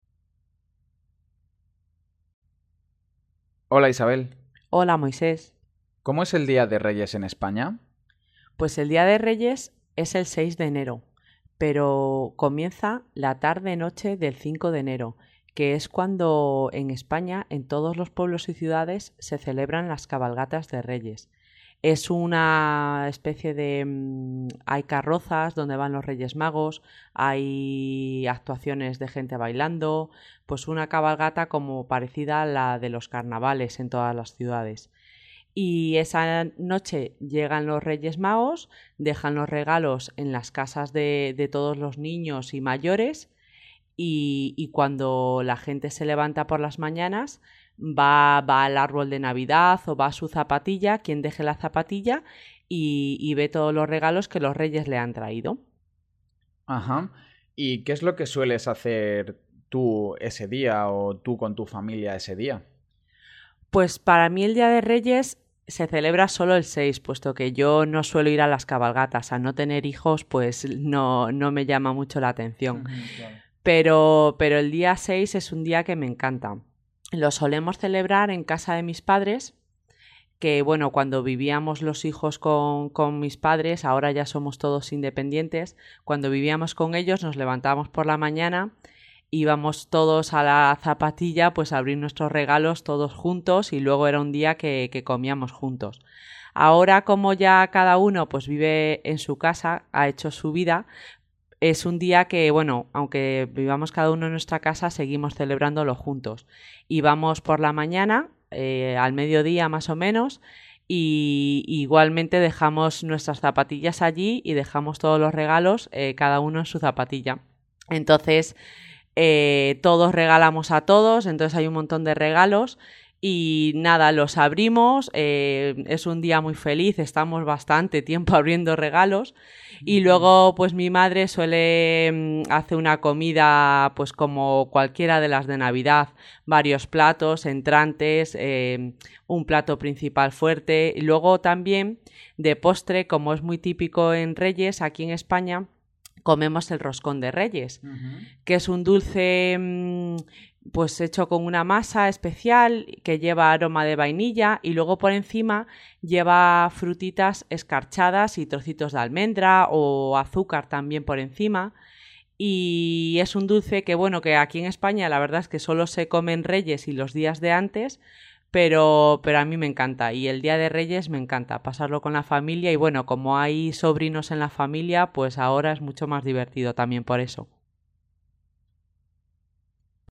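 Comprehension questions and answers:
Responde las preguntas del audio. Señala solo las afirmaciones que sean completamente correctas con el audio.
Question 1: La cabalgata de Reyes se celebra el 6 de enero por la tarde.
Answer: Falso

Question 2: Los Reyes dejan los regalos en el árbol de Navidad.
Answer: Verdadero

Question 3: Isabel ya no celebra el Día de Reyes con su familia porque no vive con sus padres.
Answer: Falso

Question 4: En la parte de arriba del roscón de reyes (el dulce tradicional) hay frutas y almendra.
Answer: Verdadero

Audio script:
MOISÉS: Hola Isabel
ISABEL: Hola Moisés
MOISÉS: ¿Cómo es el día de Reyes en España?
ISABEL: Pues el día de Reyes es el seis de enero, pero... comienza, la tarde-noche del cinco de enero, que es cuando, en España en todos los pueblos y ciudades se celebran las Cabalgatas de Reyes. Es una... especie de... hay carrozas donde van los Reyes Magos, hay actuaciones de gente bailando, pues una cabalgata como parecida a la de los Carnavales en todas las ciudades. 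Y esa noche llegan los Reyes Magos, dejan los regalos en las casas de, de todos los niños y mayores y, y cuando la gente se levanta por la mañana va, va al árbol de Navidad o va a su zapatilla quien deje la zapatilla y, y ve todos los regalos que los Reyes le han traído.
MOISÉS: ¡Ajá! ¿Y qué es lo que sueles hacer tú ese día o tú con tu familia ese día?
ISABEL: Pues para mí el día de Reyes se celebra sólo el seis, puesto que yo no suelo ir a las cabalgatas, al no tener hijos, pues no, no me llama mucho la atención, pero, pero el día seis, es un día que me encanta. Lo solemos celebrar en casa de mis padres, que, bueno, cuando vivíamos los hijos con mis padres, ahora ya somos todos independientes. Cuando vivíamos con ellos, nos levantábamos por la mañana, íbamos todos a la zapatilla, pues a abrir nuestros regalos todos juntos y luego era un día que comíamos juntos. Ahora, como ya cada uno, pues vive en su casa, ha hecho su vida, es un día que bueno, aunque vivamos cada uno en nuestra casa seguimos celebrándolo juntos, y vamos por la mañana, eh... 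al mediodía, más o menos y, y igualmente dejamos nuestras zapatillas allí y dejamos todos los regalos, eh cada uno en su zapatilla.
Entonces, eh, todos regalamos a todos, entonces hay un montón de regalos y nada, los abrimos, eh, es un día muy feliz, estamos bastante tiempo abriendo regalos, y luego, pues mi madre suele, mm, hace una comida, pues como cualquiera de las de Navidad, varios platos, entrantes, eh, un plato principal fuerte. Luego, también, de postre, como es muy típico en Reyes, aquí en España, comemos el roscón de Reyes, que es un dulce, mm, pues hecho con una masa especial que lleva aroma de vainilla, y luego por encima lleva frutitas escarchadas y trocitos de almendra, o azúcar también por encima. Y... es un dulce que bueno, que aquí en España la verdad es que sólo se come en Reyes y los días de antes, pero, pero a mí me encanta y el día de Reyes me encanta pasarlo con la familia y bueno como hay sobrinos en la familia, pues ahora es mucho más divertido también por eso.

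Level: Nivel sugerido: B1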